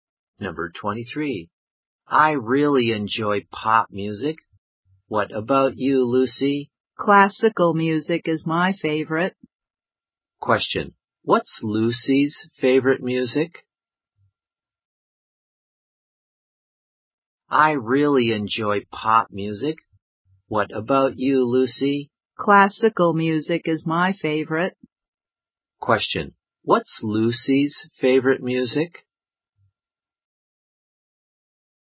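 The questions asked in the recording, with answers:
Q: What's Lucy's favorite music?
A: Classical music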